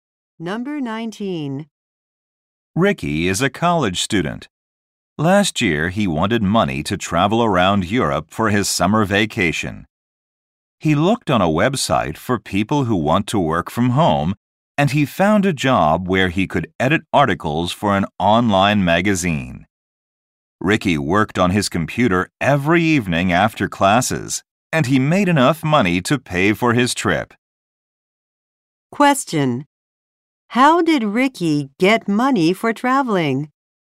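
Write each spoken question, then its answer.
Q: How did Ricky get money for traveling?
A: By editing articles for an online magazine from home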